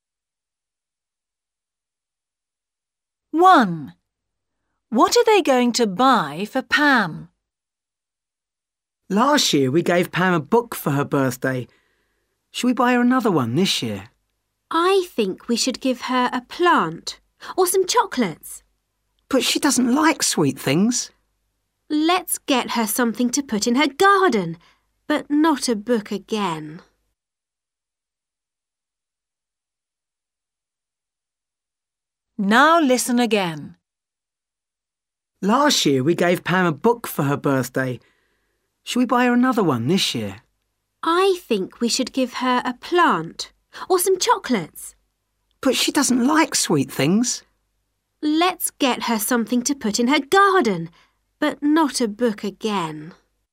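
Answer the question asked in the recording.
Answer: A plant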